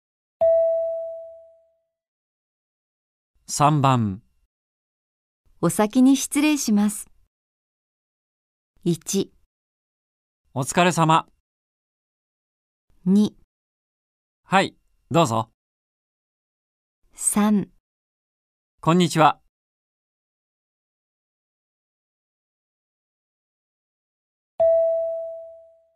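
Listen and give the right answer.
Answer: 1: お疲れ様。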